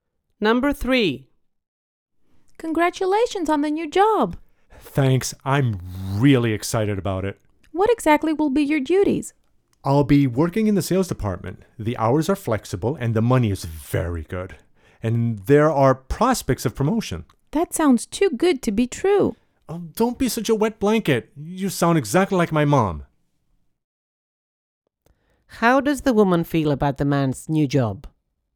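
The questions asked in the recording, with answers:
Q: How does the woman feel about the man's new job?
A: She is skeptical; it seems too good to be true.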